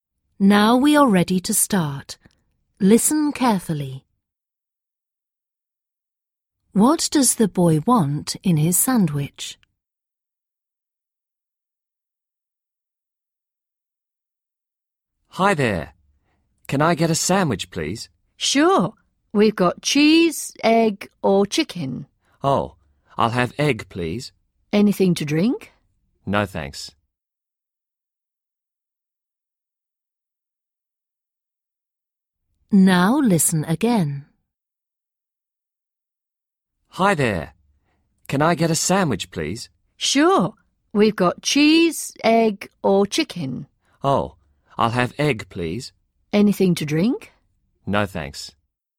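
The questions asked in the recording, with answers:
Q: What does the boy want in his sandwich?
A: egg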